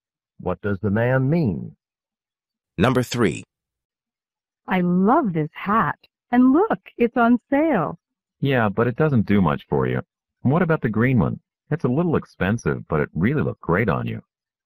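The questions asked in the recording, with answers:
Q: What can be inferred about the man?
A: He thinks she should buy the green hat instead.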